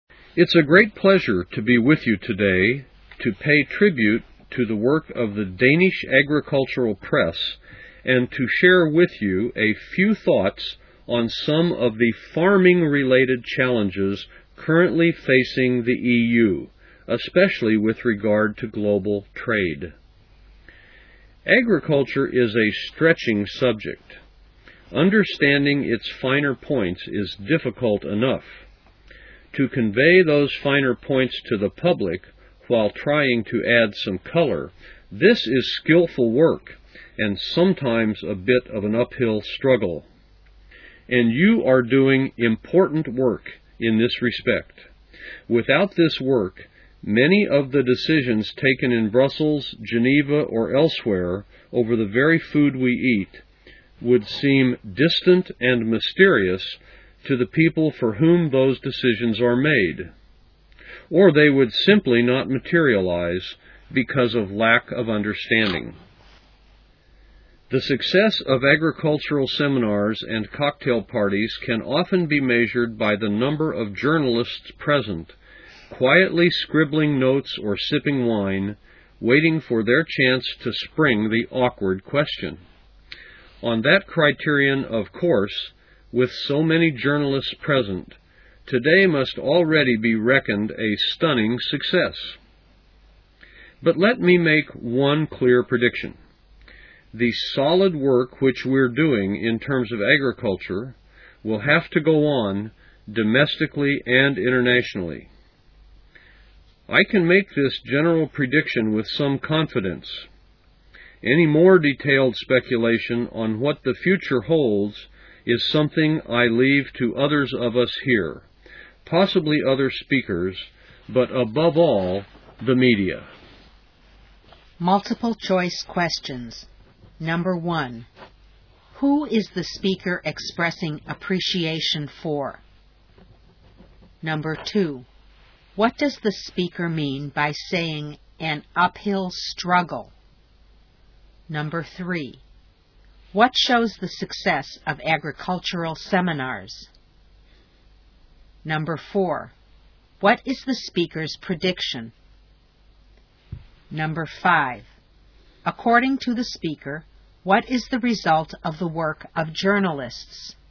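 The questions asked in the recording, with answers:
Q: who is the speaker expressing appreciation for?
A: The Danish Agricultural Press (agricultural journalists)

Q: what does the speaker mean by saying an uphill struggle?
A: Conveying the finer points of agriculture to the public is difficult work

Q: what shows the success of agricultural seminars?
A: The number of journalists present

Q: what is the speaker's prediction?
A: The solid work on agriculture will have to go on domestically and internationally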